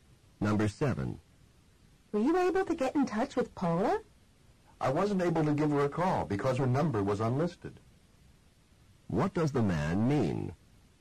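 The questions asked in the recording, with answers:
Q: What does the man mean?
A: He could not call Paula because her number was unlisted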